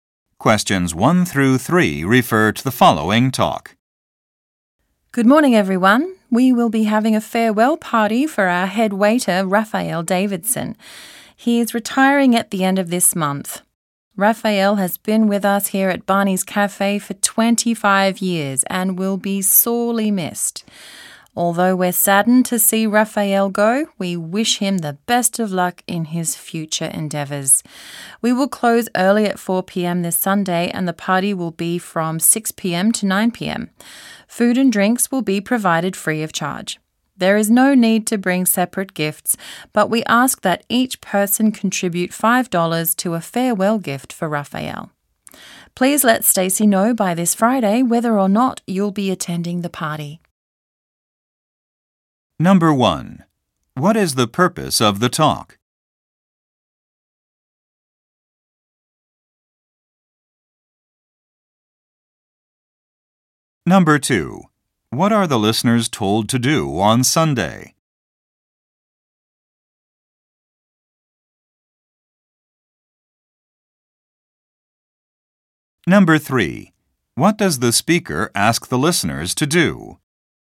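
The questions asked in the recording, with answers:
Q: What is the purpose of the talk?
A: To announce a farewell party for a retiring head waiter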